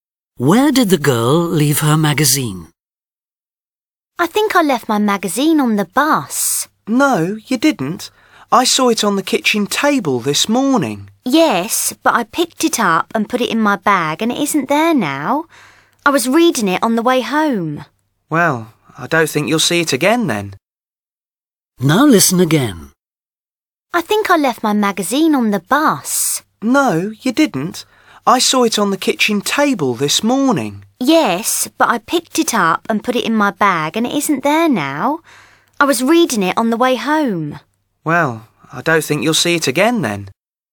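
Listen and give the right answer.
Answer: on the bus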